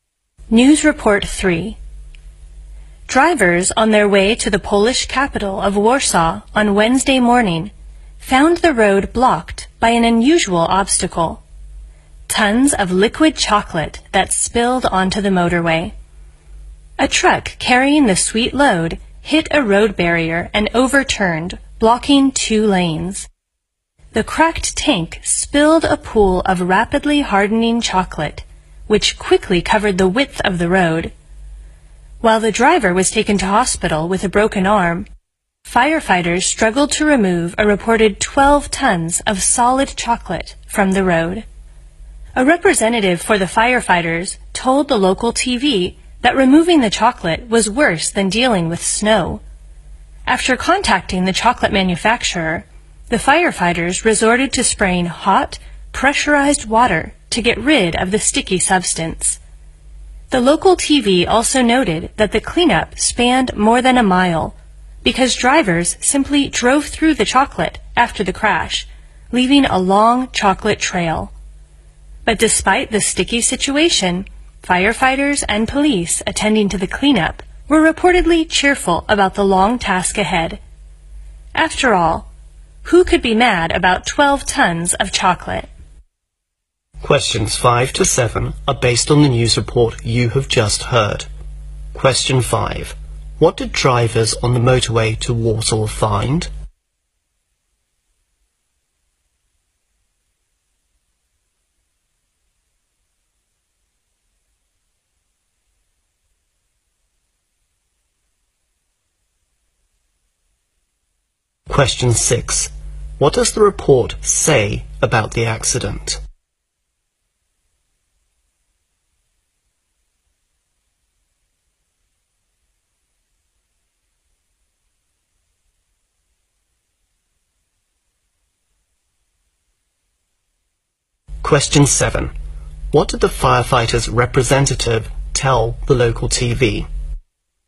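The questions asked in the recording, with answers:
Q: What did drivers on the motorway to Warsaw find?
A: Tons of spilled liquid chocolate blocking the road

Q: What does the report say about the accident?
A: A truck hit a road barrier and overturned, blocking two lanes

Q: What did the firefighter's representative tell the local TV?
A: Removing the chocolate was worse than dealing with snow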